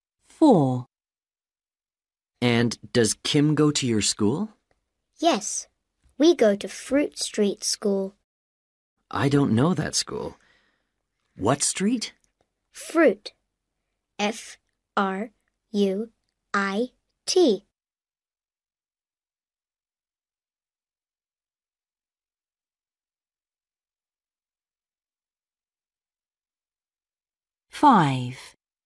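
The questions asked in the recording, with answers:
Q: And does Kim go to your school?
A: Fruit Street School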